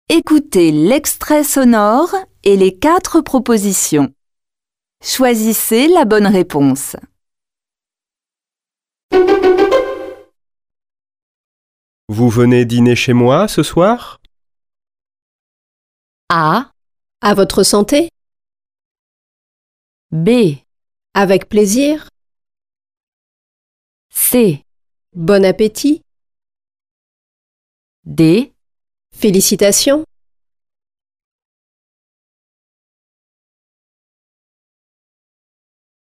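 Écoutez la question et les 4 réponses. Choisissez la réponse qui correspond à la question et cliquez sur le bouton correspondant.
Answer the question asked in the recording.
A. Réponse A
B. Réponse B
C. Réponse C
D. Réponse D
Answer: B. Réponse B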